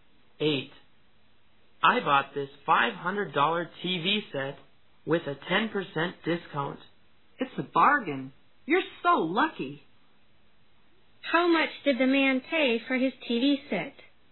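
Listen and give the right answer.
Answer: $450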